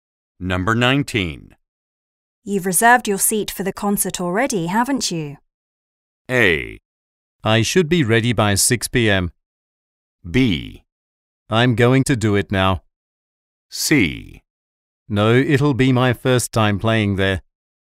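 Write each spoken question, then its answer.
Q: You've reserved your seat for the concert already, haven't you?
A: B: I'm going to do it now.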